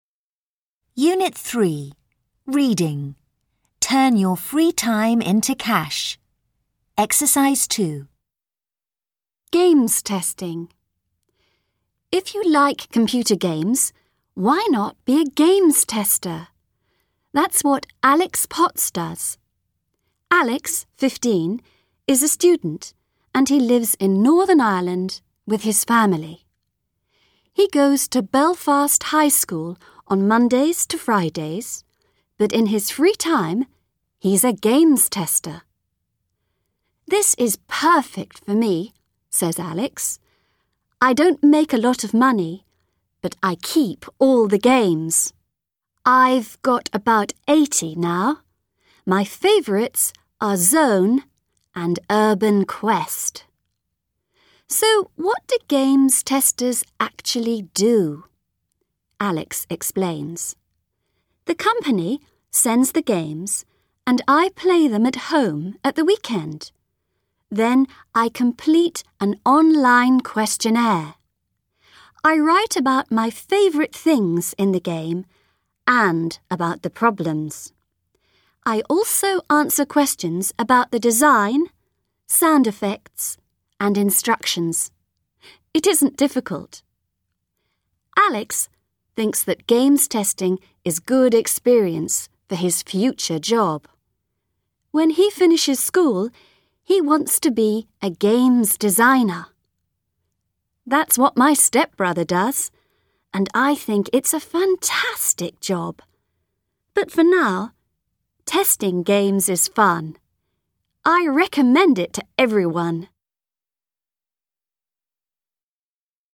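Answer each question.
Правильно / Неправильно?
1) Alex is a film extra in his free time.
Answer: Неправильно

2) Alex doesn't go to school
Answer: Неправильно

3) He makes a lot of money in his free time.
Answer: Неправильно

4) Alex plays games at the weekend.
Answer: Правильно

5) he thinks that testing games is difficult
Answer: Неправильно

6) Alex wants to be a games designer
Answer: Правильно

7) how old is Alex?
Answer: 15

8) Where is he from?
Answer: Northern Ireland

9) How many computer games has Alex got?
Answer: about 80

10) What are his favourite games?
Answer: Zone and Urban Quest

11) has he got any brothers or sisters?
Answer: Yes, a stepbrother

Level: 6 «А, Б, Д»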